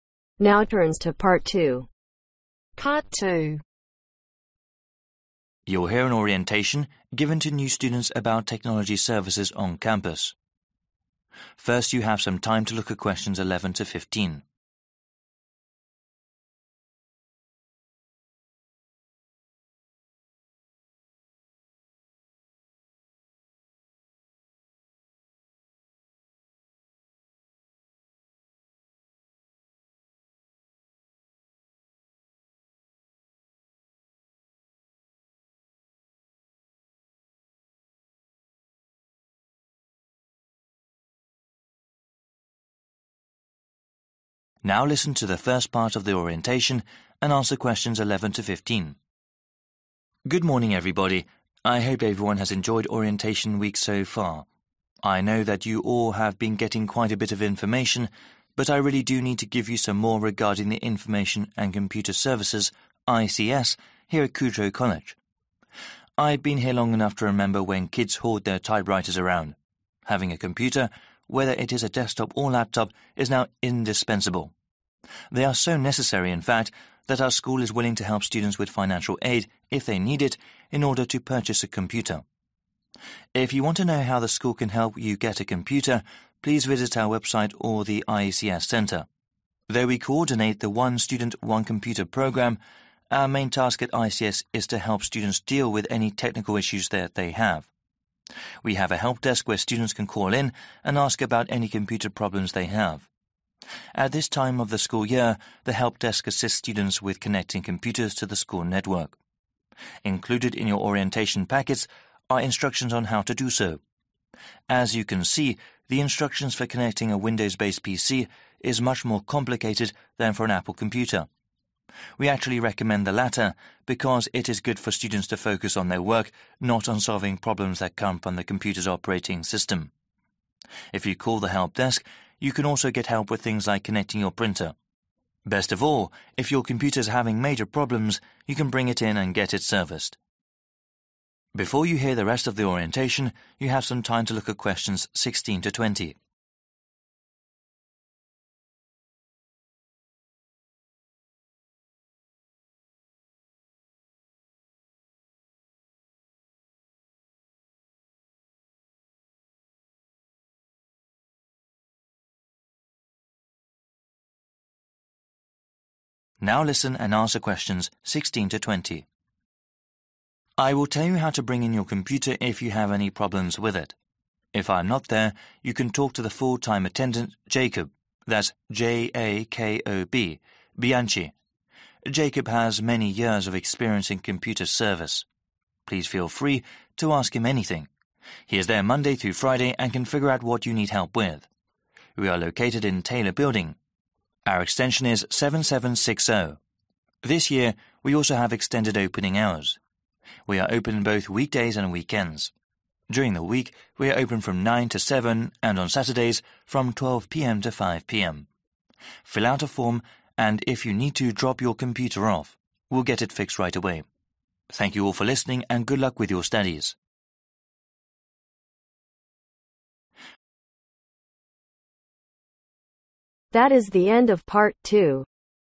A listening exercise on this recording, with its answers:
Complete the table below. Write NO MORE THAN TWO WORDS for each answer.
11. Helps students acquire a (11)............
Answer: Laptop/Desktop/Computer

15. If someone is having (15)............, they can get whatever broken repaired.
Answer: Major problems

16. Full – time attendant (16)............ Bianci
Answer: Jakob

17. Days attendant is available (17)............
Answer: Monday through Friday

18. Extension Number (18)............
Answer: 7760

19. Opening hours Weekdays: (19)............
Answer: 9 to 7

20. (20)............ From 12 to 5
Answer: Saturday (s)